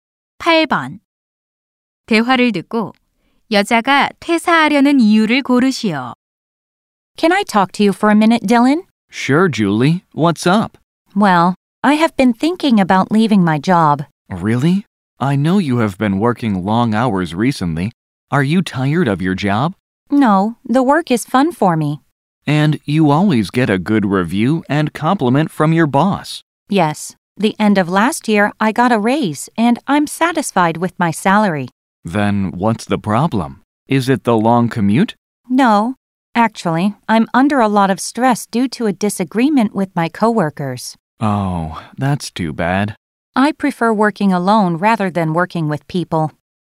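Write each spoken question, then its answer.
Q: 대화를 듣고 여자가 퇴사하려는 이유를 고르시오.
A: 동료들과의 의견 충돌로 인한 스트레스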